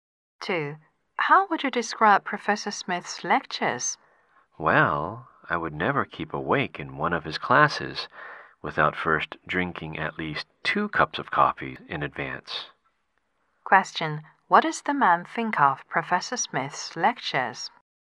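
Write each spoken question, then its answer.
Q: what does the man think of Professor Smith's lectures?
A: They are boring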